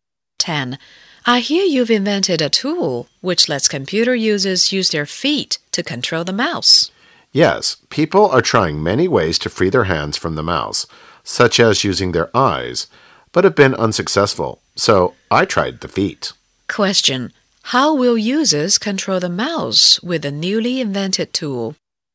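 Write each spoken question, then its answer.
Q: How will users control the mouse with a newly invented tool?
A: With their feet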